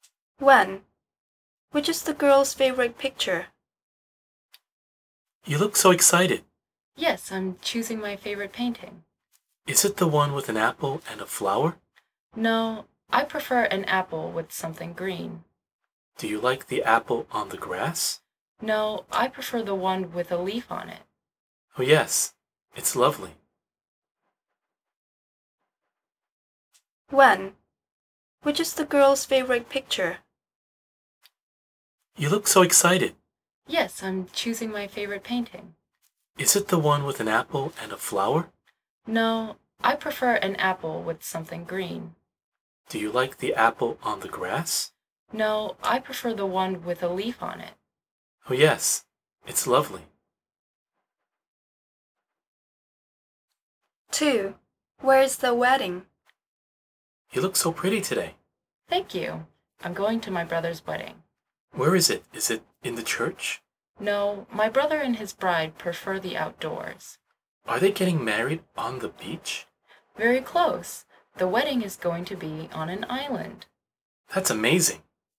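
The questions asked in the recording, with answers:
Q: Which is the girl's favorite picture?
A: the apple with a leaf on it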